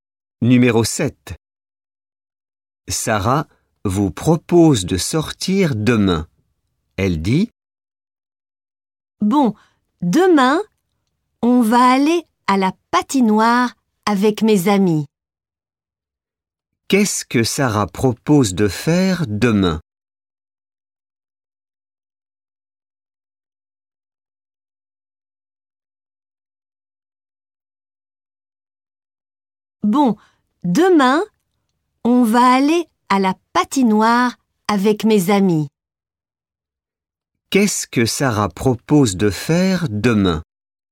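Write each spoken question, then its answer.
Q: Qu'est-ce que Sarah propose de faire demain?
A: aller à la patinoire avec ses amis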